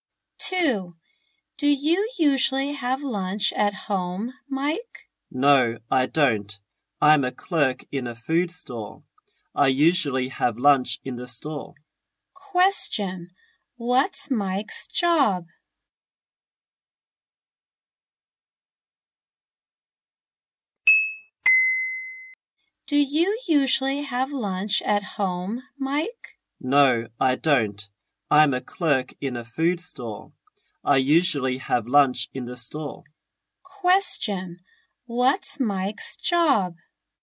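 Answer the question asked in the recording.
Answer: A clerk in a food store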